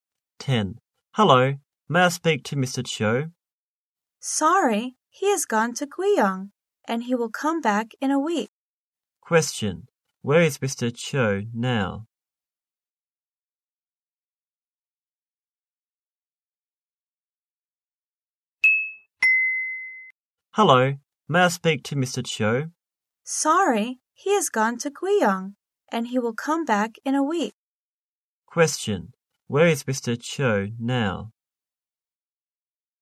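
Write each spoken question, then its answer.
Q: Where is Mr. Cho now?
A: In Guiyang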